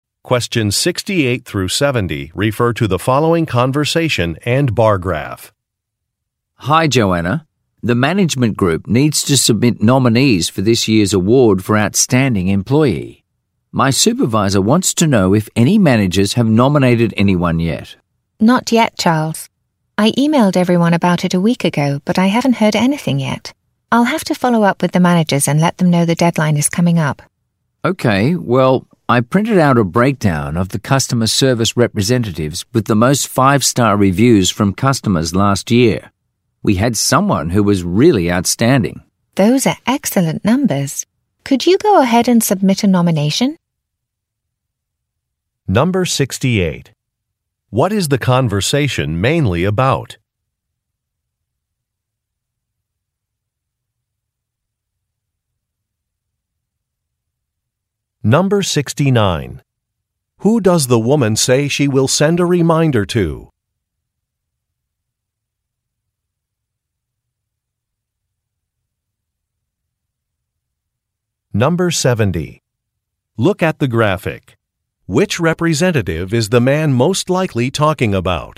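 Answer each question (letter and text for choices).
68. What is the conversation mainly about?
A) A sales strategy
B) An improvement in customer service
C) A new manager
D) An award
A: D) An award

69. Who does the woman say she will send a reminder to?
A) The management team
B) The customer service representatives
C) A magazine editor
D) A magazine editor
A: A) The management team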